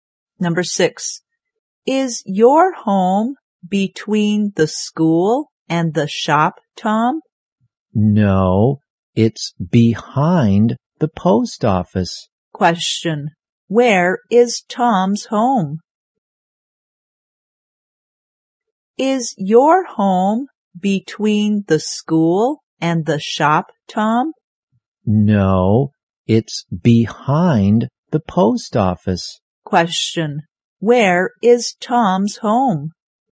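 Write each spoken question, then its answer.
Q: Question, where is Tom's home?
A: Behind the post office.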